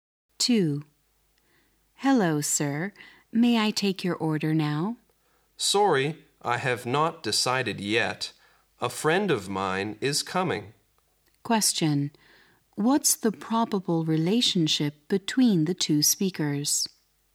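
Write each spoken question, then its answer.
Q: What's the probable relationship between the 2 speakers?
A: Waiter and customer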